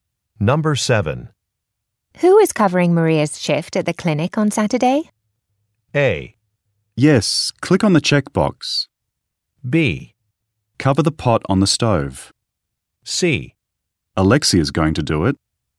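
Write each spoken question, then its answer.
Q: Who is covering Maria's shift at the clinic on Saturday?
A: C: Alexia is going to do it.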